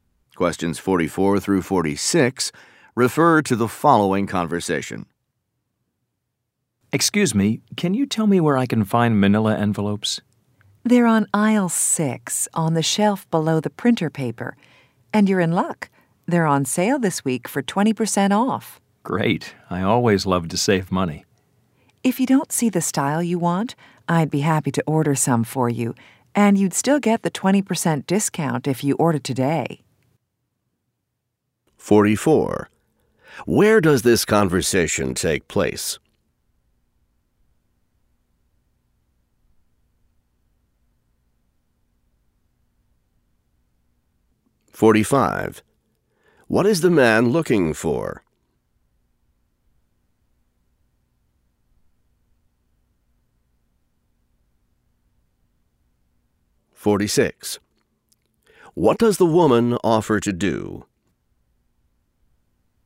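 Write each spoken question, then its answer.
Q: Where does this conversation take place?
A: In a store (office supply store)

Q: What is the man looking for?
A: Manila envelopes

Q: What does the woman offer to do?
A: Order some envelopes for him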